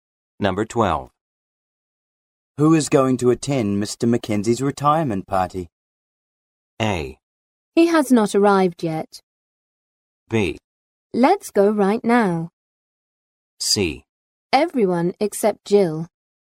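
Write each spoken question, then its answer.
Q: Who is going to attend Mr. McKenzie's retirement party?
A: C: Everyone except Jill.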